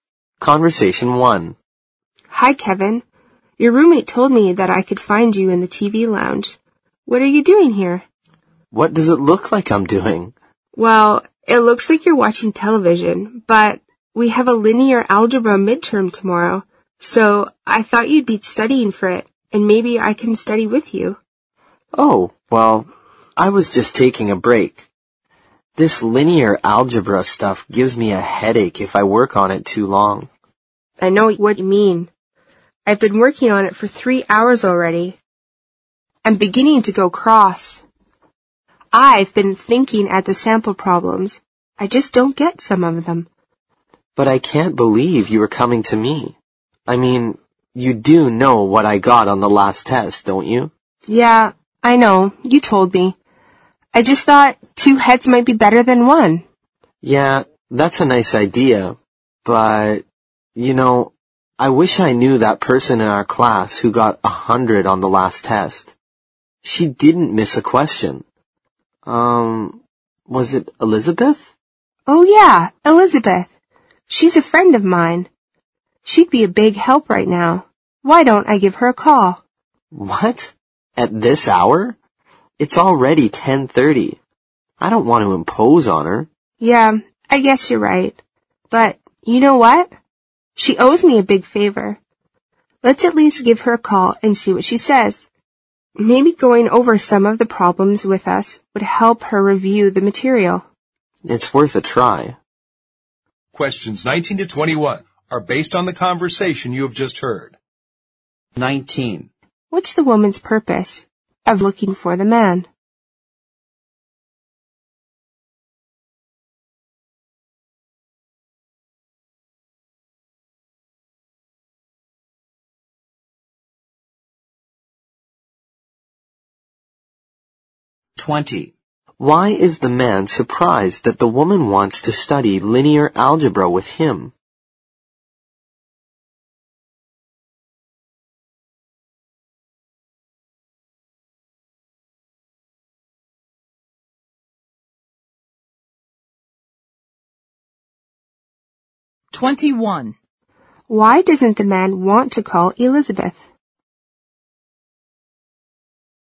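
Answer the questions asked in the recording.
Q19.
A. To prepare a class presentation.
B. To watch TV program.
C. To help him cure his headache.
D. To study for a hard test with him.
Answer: D. To study for a hard test with him.
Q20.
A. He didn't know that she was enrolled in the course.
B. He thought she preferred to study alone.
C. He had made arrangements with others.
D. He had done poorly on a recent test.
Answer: D. He had done poorly on a recent test.
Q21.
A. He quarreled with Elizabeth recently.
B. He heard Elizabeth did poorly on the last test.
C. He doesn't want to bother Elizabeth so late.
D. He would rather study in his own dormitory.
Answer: C. He doesn't want to bother Elizabeth so late.

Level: 四级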